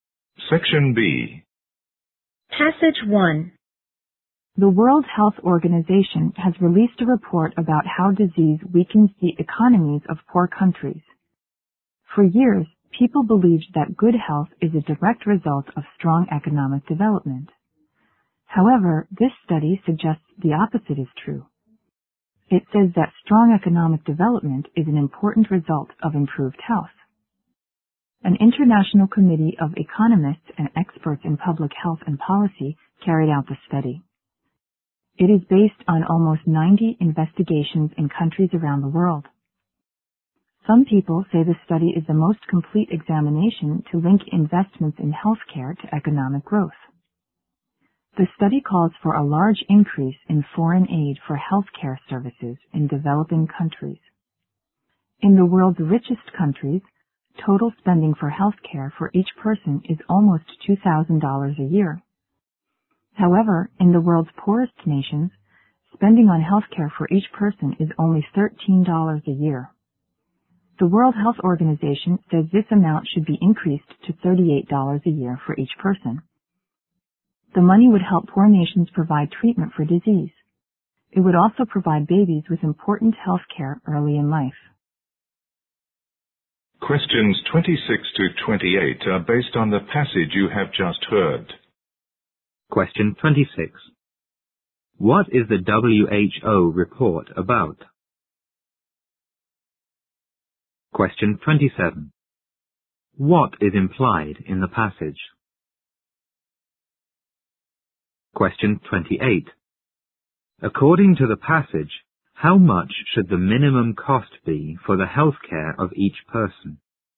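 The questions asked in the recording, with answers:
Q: What is the WHO report about?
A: How disease weakens the economies of poor countries

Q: According to the passage, how much should the minimum cost be for the health care of each person?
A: $38 a year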